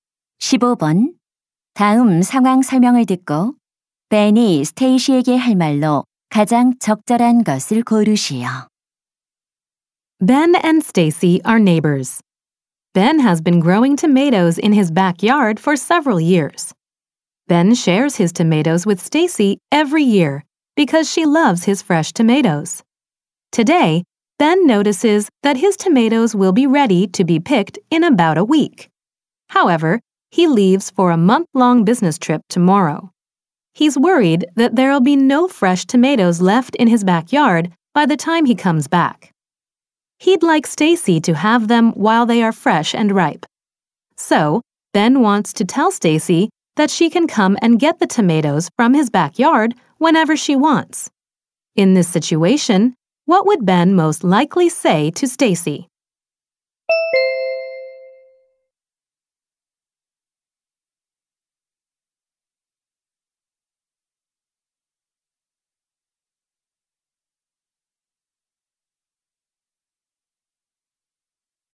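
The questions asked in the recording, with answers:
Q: In this situation, what would Ben most likely say to Stacy?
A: Feel free to come and pick my tomatoes whenever you want while I'm away.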